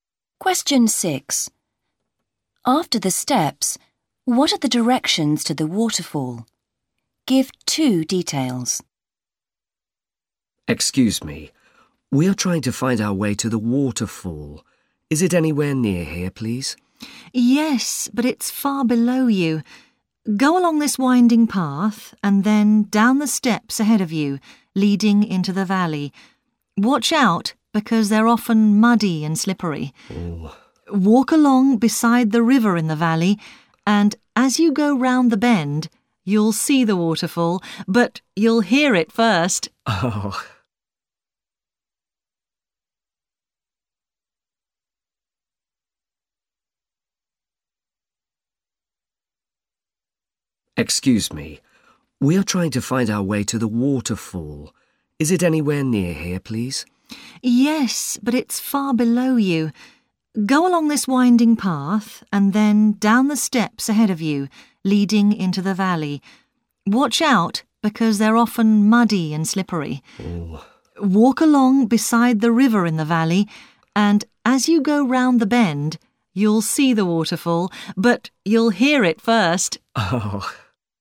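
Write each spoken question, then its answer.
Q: After the steps, what are the directions to the waterfall?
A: Walk beside the river in the valley and go round the bend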